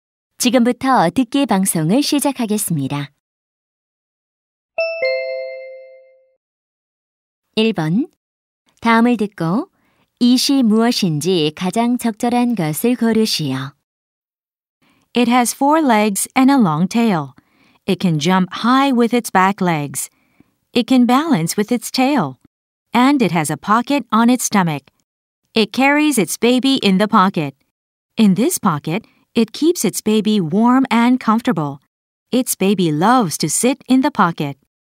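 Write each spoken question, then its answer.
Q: 다음을 듣고 이시 무엇인지 가장 적절한 것을 고르시오.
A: 캥거루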